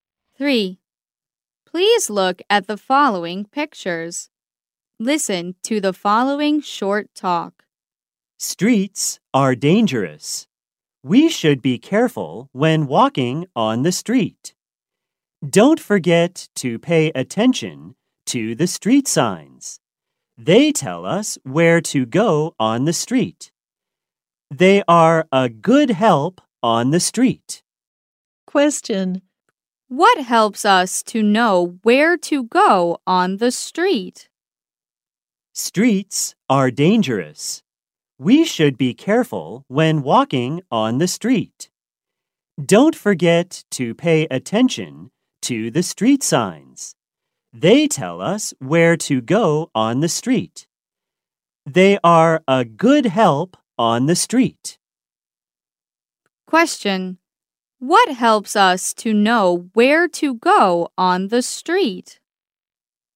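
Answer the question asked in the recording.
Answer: Street signs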